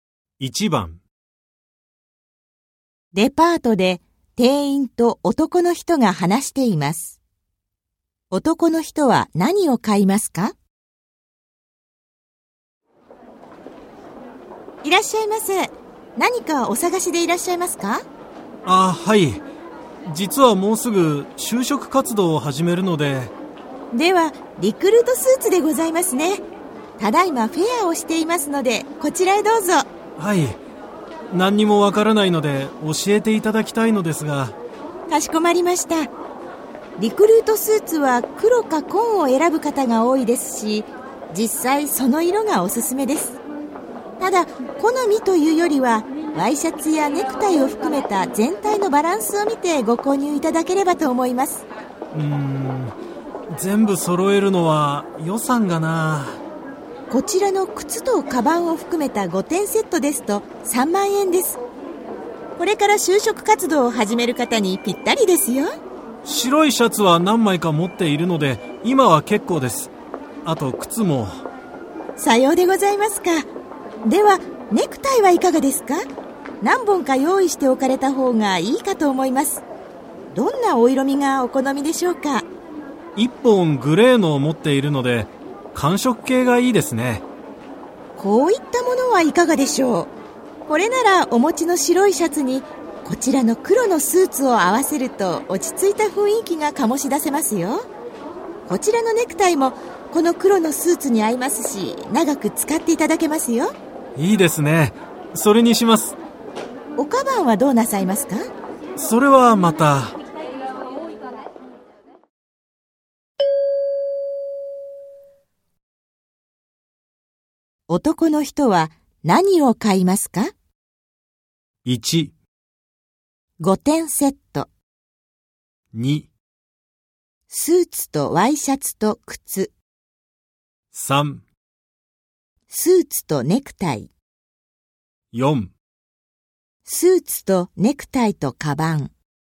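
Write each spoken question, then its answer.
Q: 男の人は何を買いますか?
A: 3: スーツとネクタイ。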